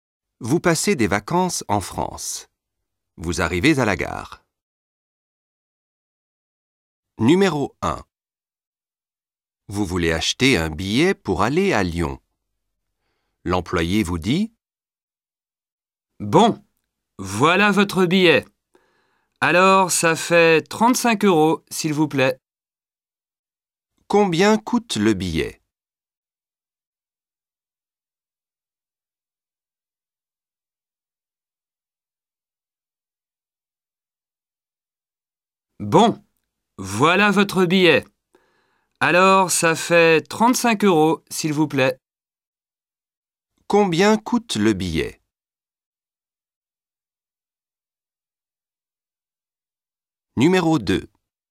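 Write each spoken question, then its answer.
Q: Combien coûte le billet?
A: 35 euros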